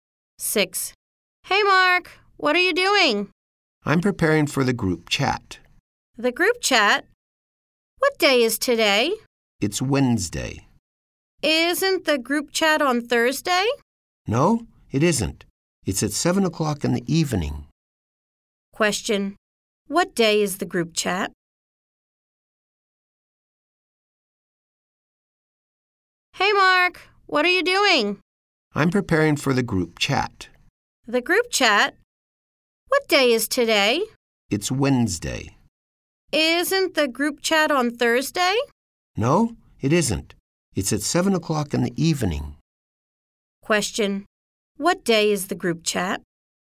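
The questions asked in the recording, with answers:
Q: What day is the group chat?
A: Wednesday (today)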